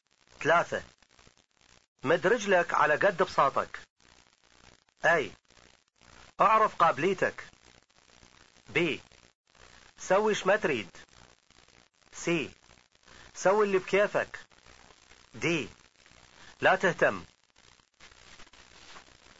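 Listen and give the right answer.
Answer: أي: أعرف قابليتك.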